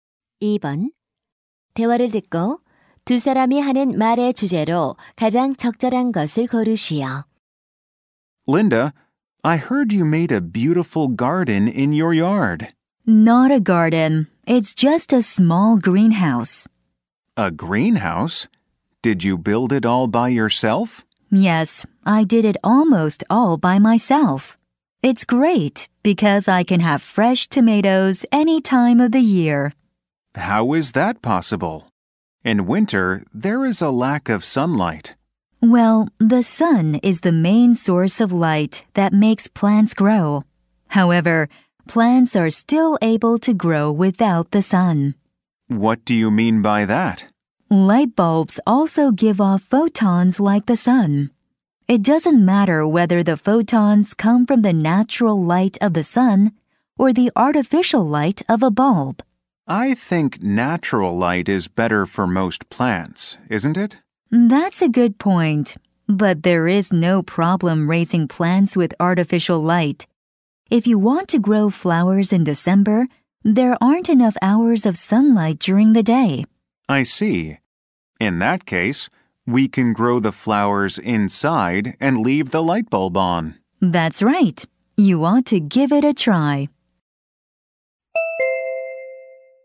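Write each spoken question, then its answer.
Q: 대화를 듣고 두 사람이 하는 말의 주제로 가장 적절한 것을 고르시오.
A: 인공 조명으로 식물 기르기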